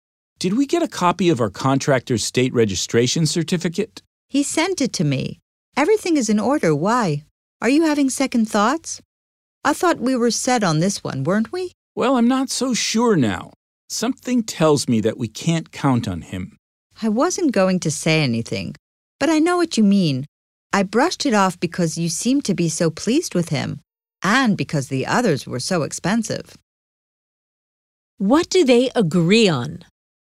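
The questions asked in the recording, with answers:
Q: What do they agree on?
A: They can't count on the contractor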